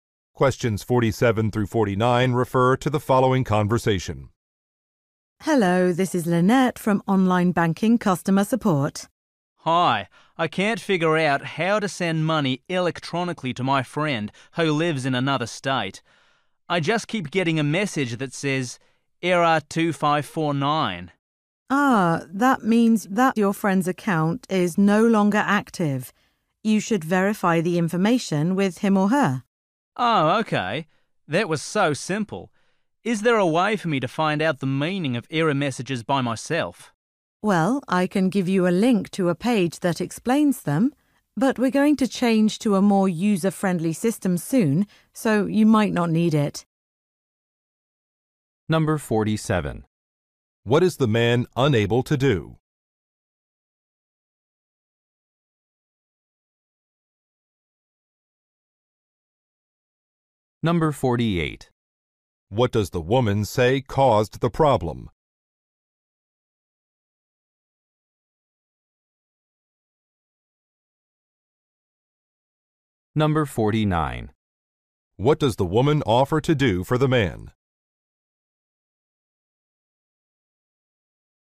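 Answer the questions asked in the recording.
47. Send money electronically to a friend
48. The friend's account is no longer active
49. Give him a link to a page explaining error messages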